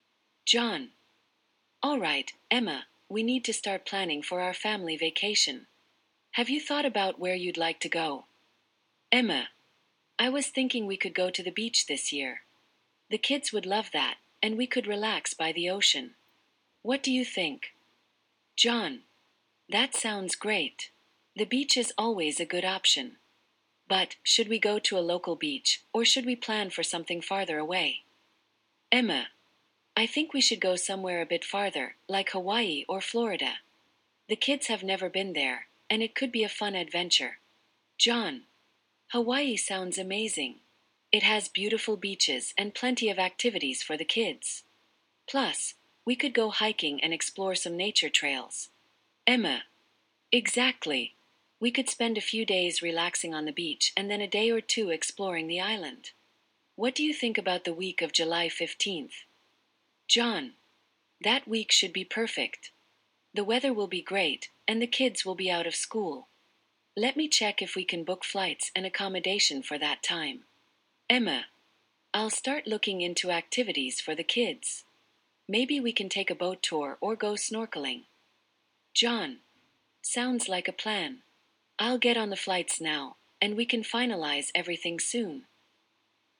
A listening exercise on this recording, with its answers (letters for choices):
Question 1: Where does Emma suggest the family should go for vacation?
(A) Florida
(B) Hawaii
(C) Local beach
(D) Disneyland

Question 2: What does John think about Hawaii?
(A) He thinks it's too expensive.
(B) He thinks it has beautiful beaches and good hiking.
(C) He prefers a colder destination.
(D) He has been there before and dislikes it.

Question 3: What date does Emma propose for the vacation?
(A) July 1st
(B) July 15th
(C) June 15th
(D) August 1st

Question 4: What activity does Emma suggest for the kids?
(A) Skiing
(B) Snorkeling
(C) Horseback riding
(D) Visiting a museum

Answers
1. B
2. B
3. B
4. B

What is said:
John:
"Alright, Emma, we need to start planning for our family vacation. Have you thought about where you'd like to go?"
Emma:
"I was thinking we could go to the beach this year. The kids would love that, and we could relax by the ocean. What do you think?"
John:
"That sounds great! The beach is always a good option. But, should we go to a local beach, or should we plan for something farther away?"
Emma:
"I think we should go somewhere a bit farther, like Hawaii or Florida. The kids have never been there, and it could be a fun adventure."
John:
"Hawaii sounds amazing! It has beautiful beaches and plenty of activities for the kids. Plus, we could go hiking and explore some nature trails."
Emma:
"Exactly. We could spend a few days relaxing on the beach and then a day or two exploring the island. What do you think about the week of July 15th?"
John:
"That week should be perfect! The weather will be great, and the kids will be out of school. Let me check if we can book flights and accommodation for that time."
Emma:
"I'll start looking into activities for the kids. Maybe we can take a boat tour or go snorkeling!"
John:
"Sounds like a plan. I'll get on the flights now, and we can finalize everything soon."